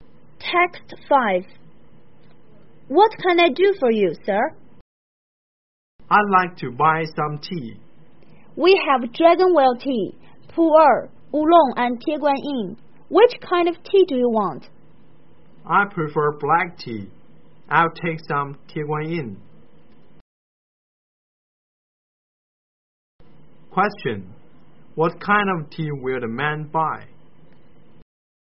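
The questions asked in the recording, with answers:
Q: What kind of tea will the man buy?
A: Tieguanyin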